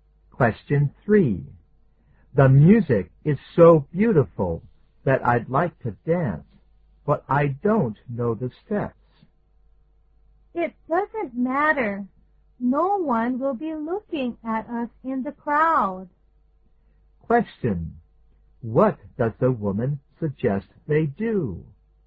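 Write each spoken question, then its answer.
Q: What does the woman suggest they do?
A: Dance anyway, since no one will notice in the crowd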